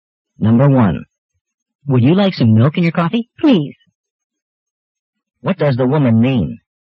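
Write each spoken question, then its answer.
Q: What does the woman mean?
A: She'd like some milk in her coffee.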